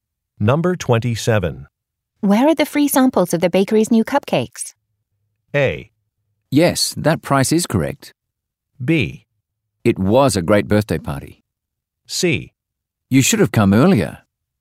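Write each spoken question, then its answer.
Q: Where are the free samples of the bakery's new cupcakes?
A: C: You should have come earlier.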